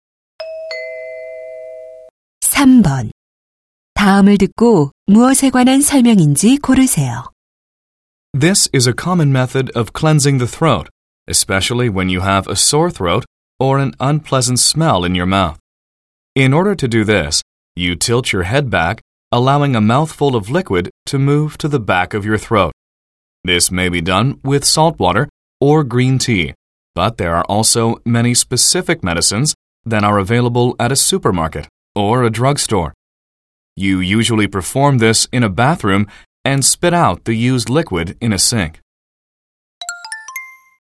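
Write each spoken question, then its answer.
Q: 다음을 듣고 무엇에 관한 설명인지 고르세요.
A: 가글(목 헹구기)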